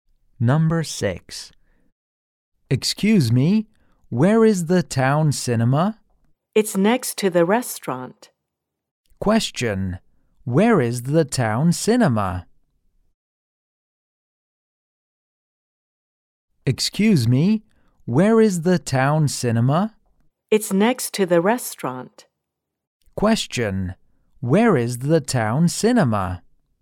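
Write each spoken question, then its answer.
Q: Where is the town cinema?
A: Next to the restaurant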